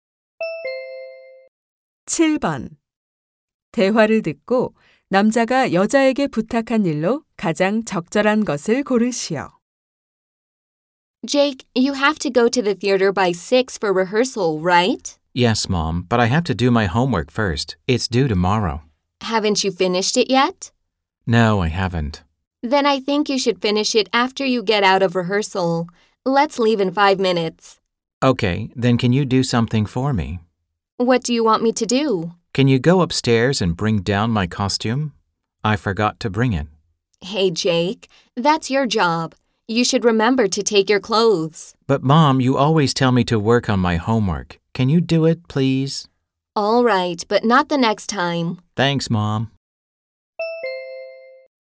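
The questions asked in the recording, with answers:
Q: 대화를 듣고 남자가 여자에게 부탁한 일로 가장 적절한 것을 고르시오.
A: 위층에서 공연 의상 가져다주기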